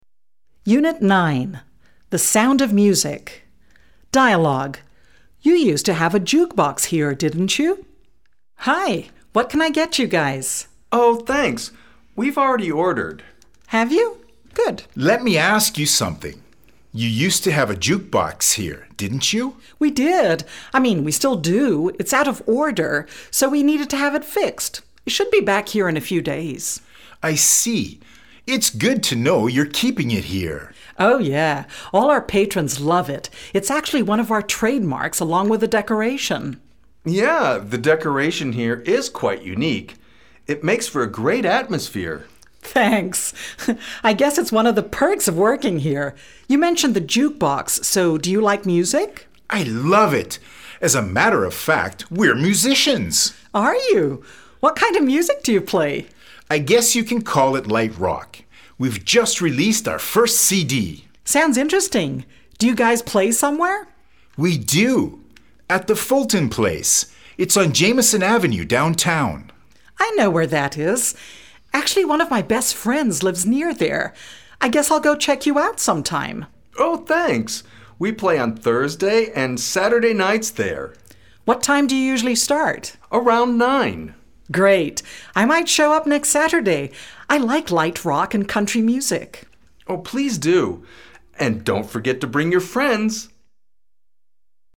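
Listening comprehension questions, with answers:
Dialogue Comprehension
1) Roy and Dave are at this snack bar for the first time.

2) The waitress doesn ́t have a clue what happened to the jukebox.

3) The waitress thinks light rock sucks.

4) Roy and Dave live near Jameson Ave.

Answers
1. False
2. False
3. False
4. I don ́t know

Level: B2-level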